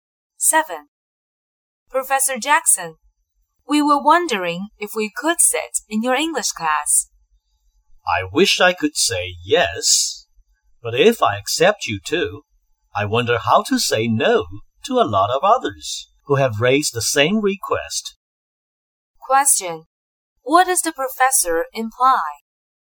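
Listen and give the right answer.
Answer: He can't let them sit in his class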